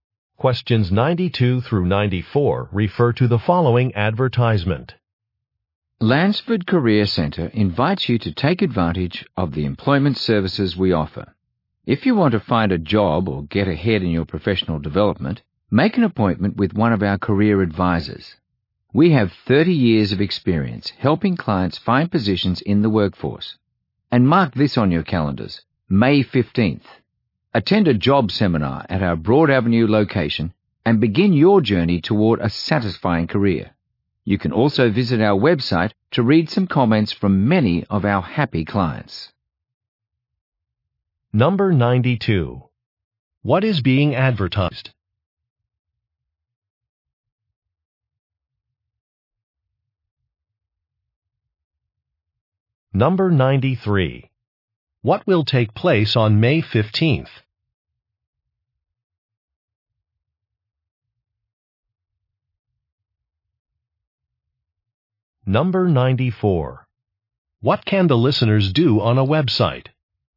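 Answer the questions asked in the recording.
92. A career center's employment services
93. A job seminar
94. Read client comments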